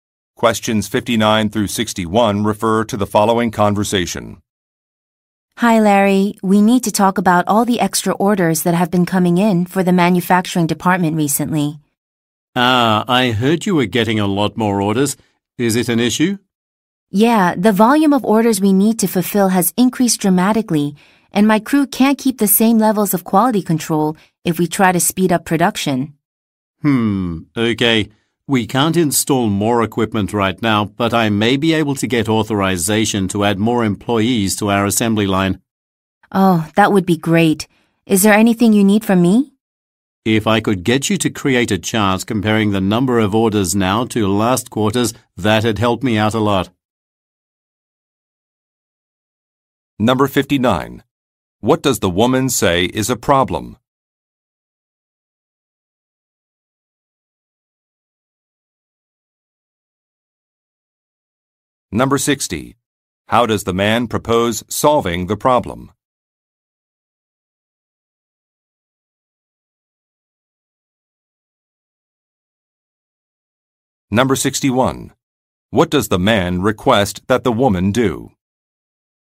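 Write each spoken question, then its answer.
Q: What does the woman say is a problem?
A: Order volume has increased so much that quality control can't be maintained if production speeds up

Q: How does the man propose solving the problem?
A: By adding more employees to the assembly line

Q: What does the man request that the woman do?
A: Create a chart comparing the current number of orders to last quarter's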